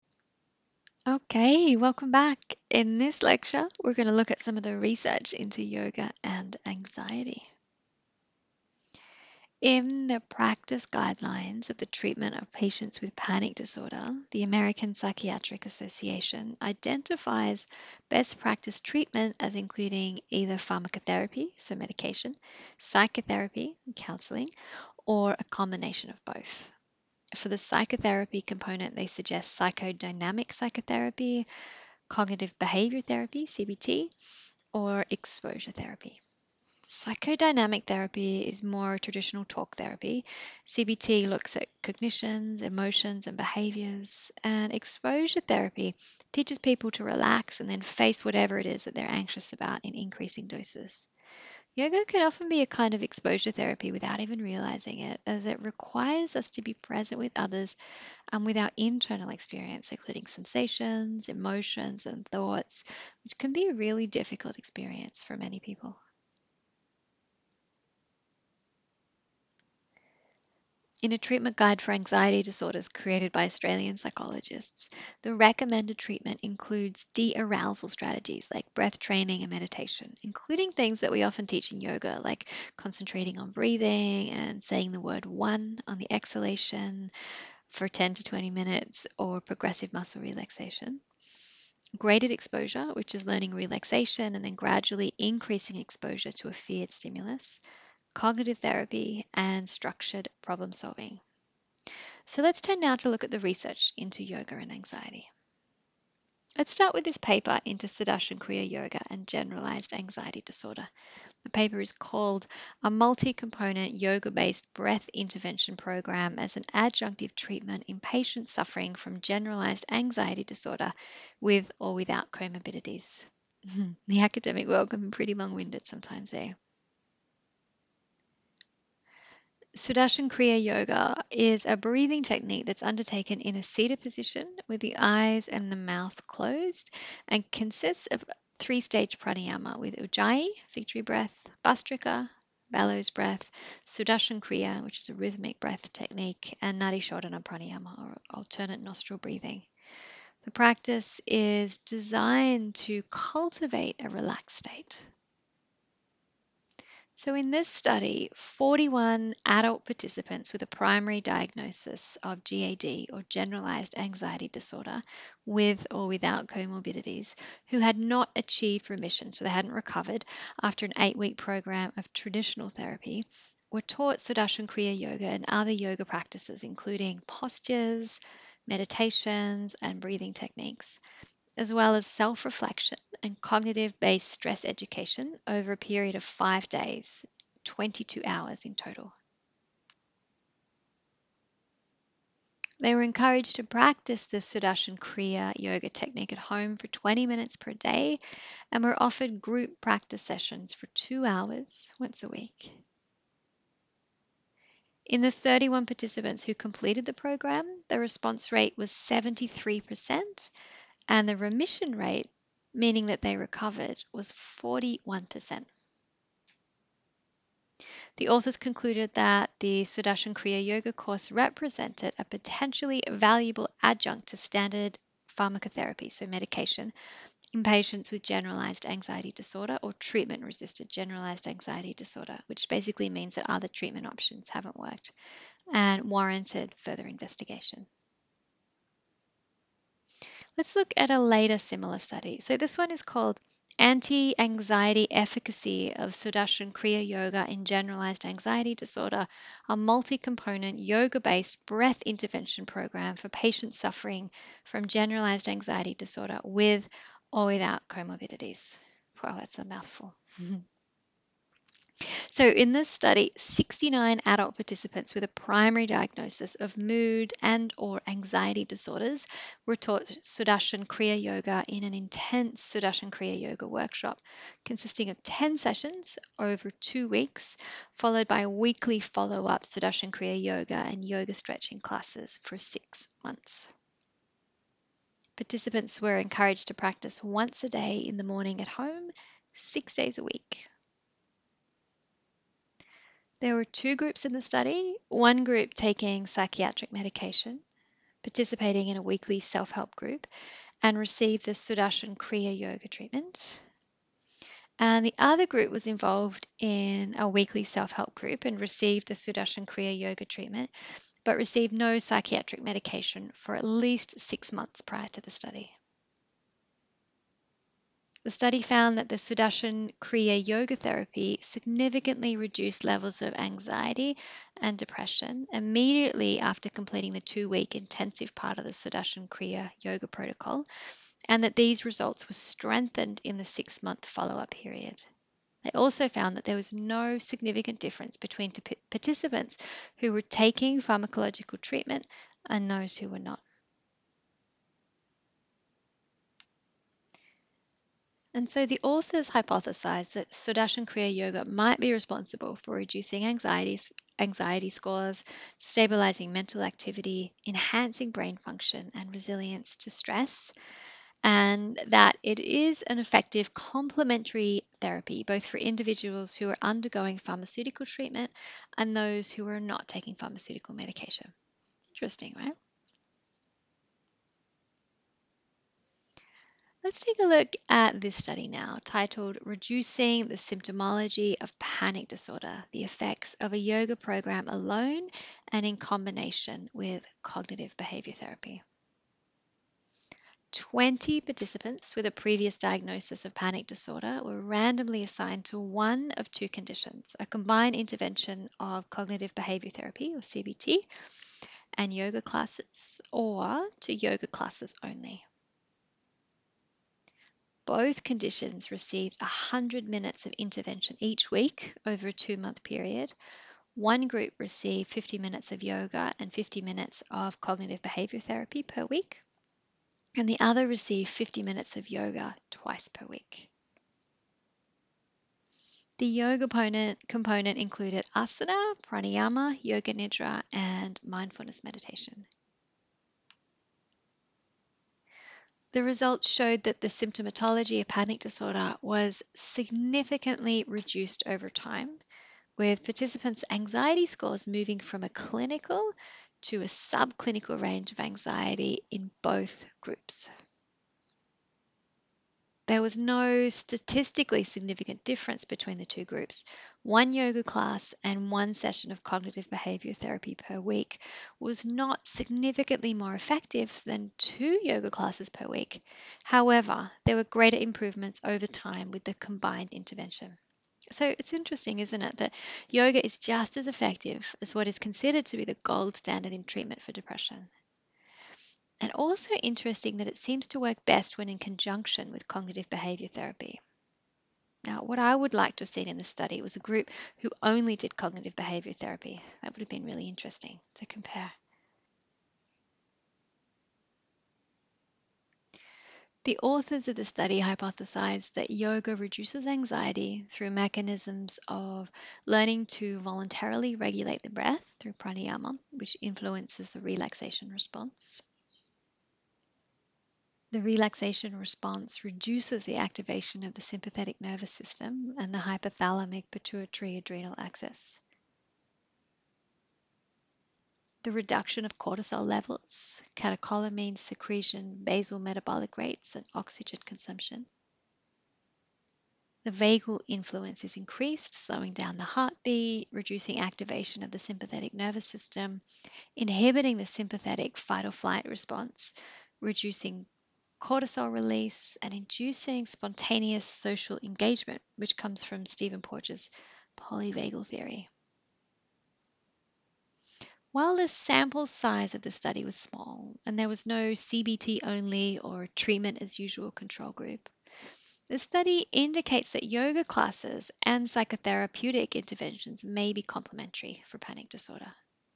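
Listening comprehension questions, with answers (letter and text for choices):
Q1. What does the American Psychiatric Association recommend for treatment for Panic Disorder?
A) Yoga.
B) Electroconvulsive Therapy.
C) Pharmacotherapy, psychotherapy (including Psychodynamic Psychotherapy, Cognitive Behaviour Therapy or Exposure Therapy), or a combination of both.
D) None of the above.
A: C) Pharmacotherapy, psychotherapy (including Psychodynamic Psychotherapy, Cognitive Behaviour Therapy or Exposure Therapy), or a combination of both.

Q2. What are the recommended treatment guidelines for anxiety disorders put out by Australian Psychologists Andrews, Creamer, Crino, Hunt, Lamp and Page?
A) Dearousal strategies like breath training and meditation (including concentrating on the breath and progressive muscle relaxation).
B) Graded exposure.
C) Cognitive therapy and structured problem solving.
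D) All of the above.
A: D) All of the above.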